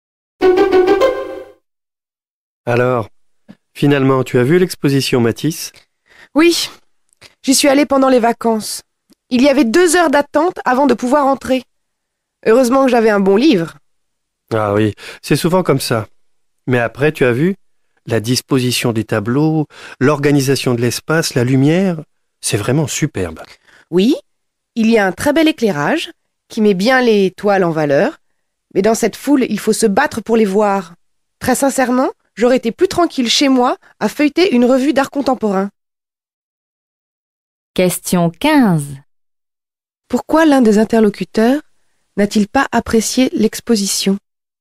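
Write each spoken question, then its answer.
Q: Pourquoi l'un des interlocuteurs n'a-t-il pas apprécié l'exposition?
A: Il y avait trop de monde.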